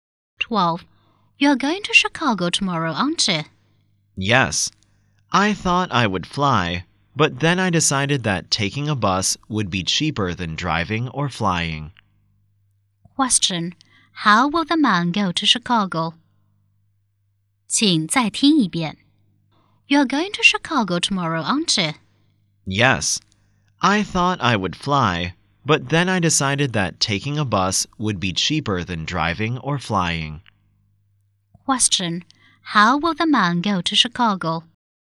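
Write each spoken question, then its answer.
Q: How will the man go to Chicago?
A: By bus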